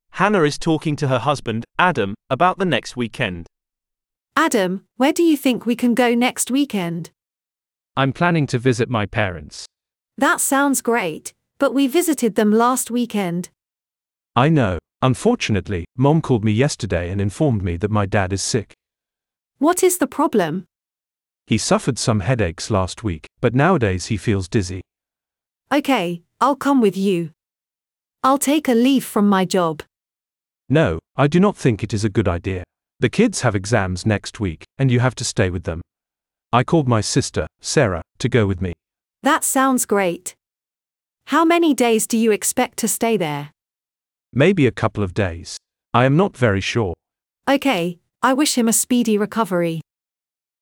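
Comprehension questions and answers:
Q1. Adam's mother informed him that his dad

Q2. Who is going with Adam?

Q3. Adam suggests that his wife should stay at home because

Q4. How many days will Adam stay away?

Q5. Where is Adam planning to go next weekend?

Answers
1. is sick
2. His sister, Sarah
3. the kids have exams next week
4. A couple of days
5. To visit his parents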